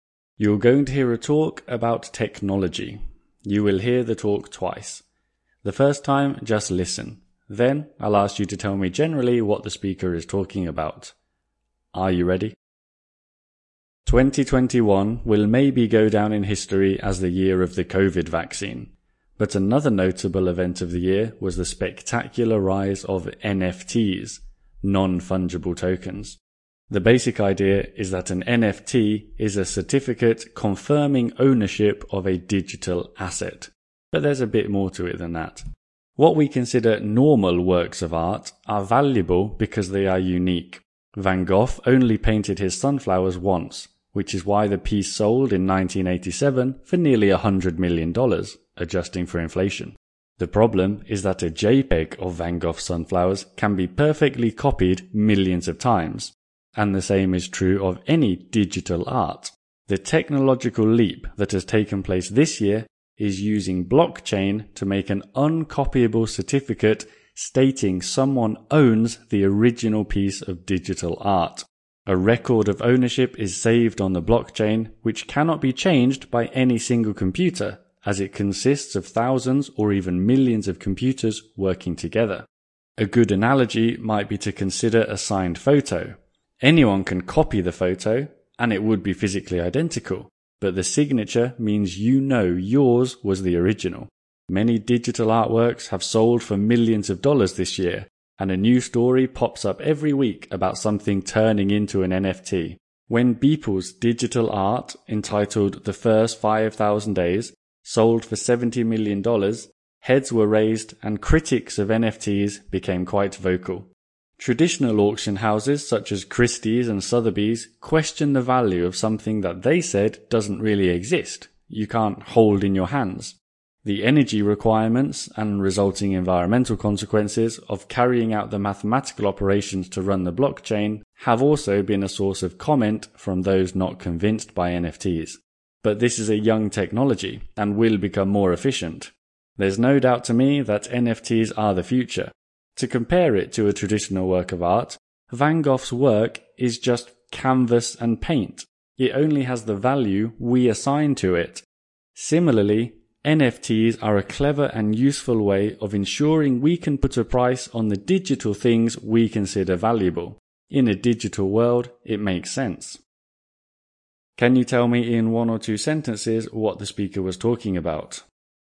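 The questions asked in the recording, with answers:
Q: Can you tell me in one or two sentences what the speaker was talking about?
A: NFTs (non-fungible tokens): blockchain certificates proving ownership of original digital art, their rise in 2021 and the criticism of them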